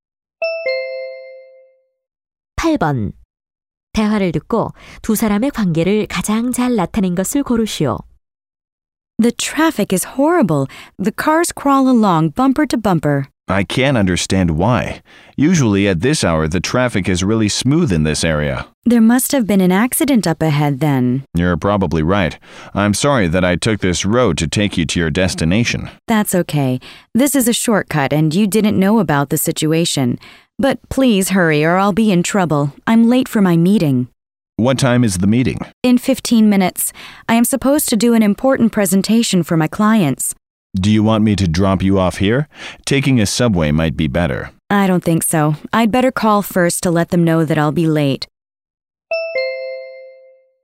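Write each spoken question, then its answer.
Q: 대화를 듣고 두 사람의 관계를 가장 잘 나타낸 것을 고르시오.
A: 택시 기사와 승객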